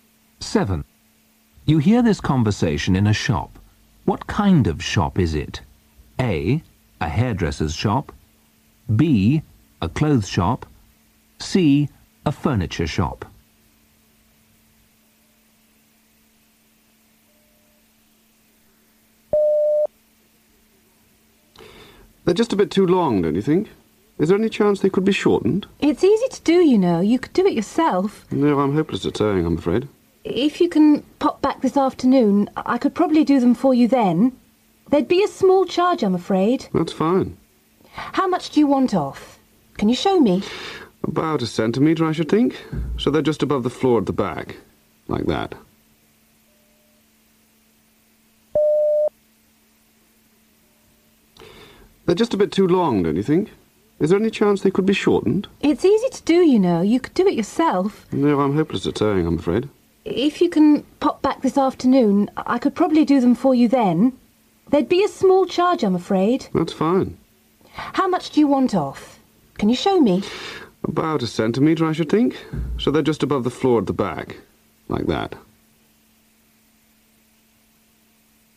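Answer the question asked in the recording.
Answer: B: A clothes shop.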